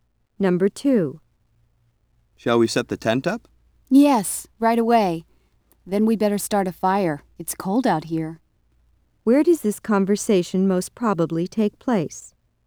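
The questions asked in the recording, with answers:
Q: Where does this conversation most probably take place?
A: At a campsite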